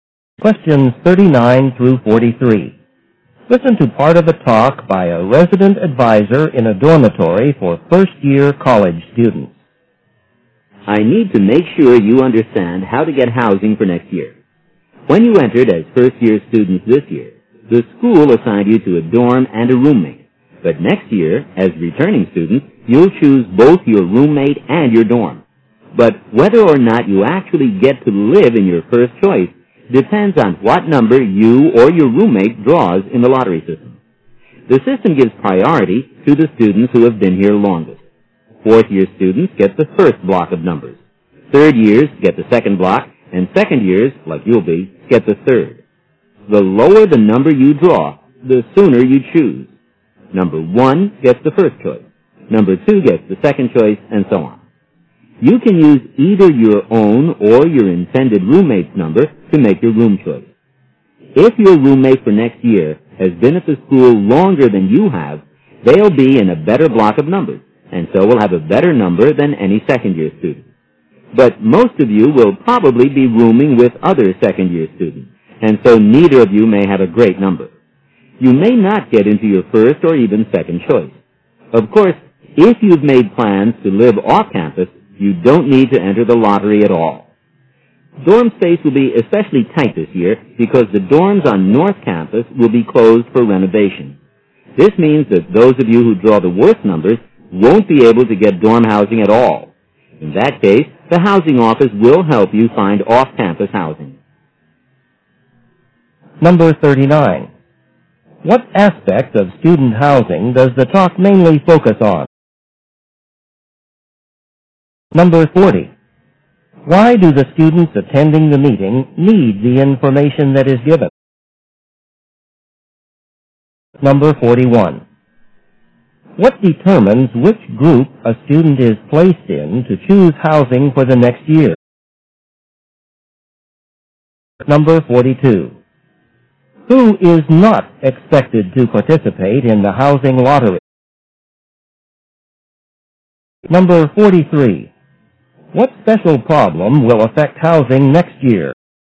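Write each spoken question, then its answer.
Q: What aspect of student housing does the talk mainly focus on?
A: The lottery for choosing dorm rooms

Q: Why do the students attending the meeting need the information that is given?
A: They must choose their own housing for next year

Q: What determines which group a student is placed in to choose housing for the next year?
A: How long the student has been at the school

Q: Who is not expected to participate in the housing lottery?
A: Students who plan to live off campus

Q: What special problem will affect housing next year?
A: The North Campus dorms will be closed for renovation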